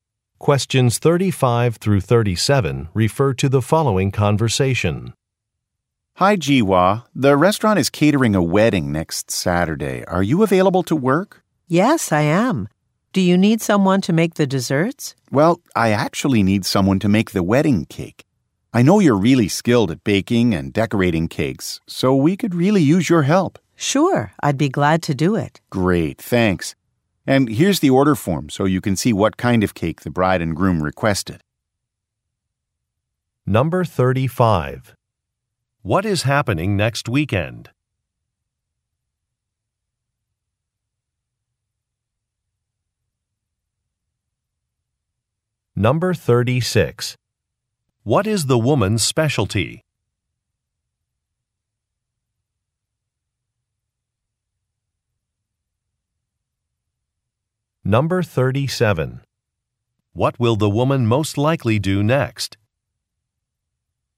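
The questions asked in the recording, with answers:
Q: What is happening next weekend?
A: A wedding

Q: What is the woman's specialty?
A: Baking and decorating cakes

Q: What will the woman most likely do next?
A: Look at an order form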